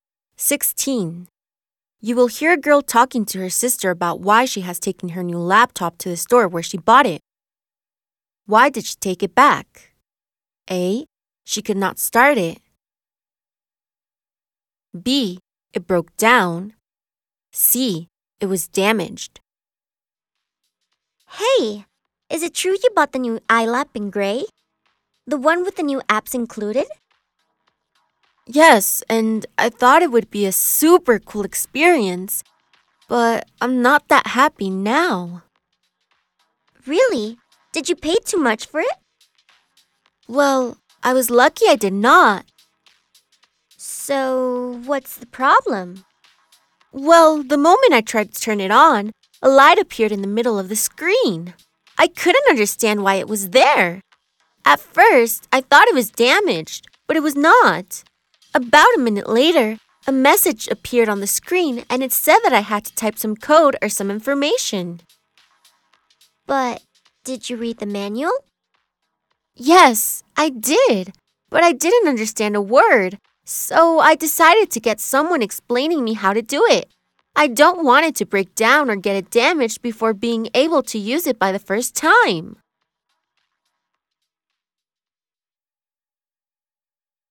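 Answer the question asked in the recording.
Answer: A: She could not start it.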